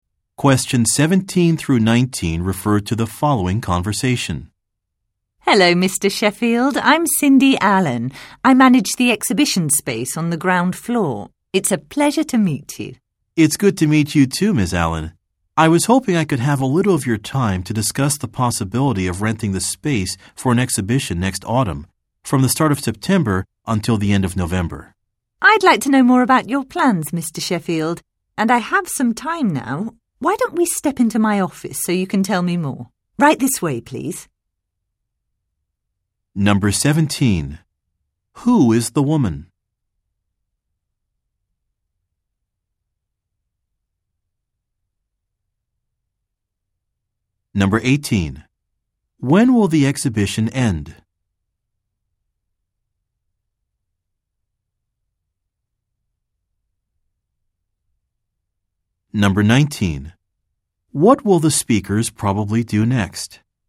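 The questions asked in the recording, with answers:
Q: Who is the woman?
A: The manager of the exhibition space

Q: When will the exhibition end?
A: At the end of November

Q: What will the speakers probably do next?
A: Go into the woman's office to discuss the plans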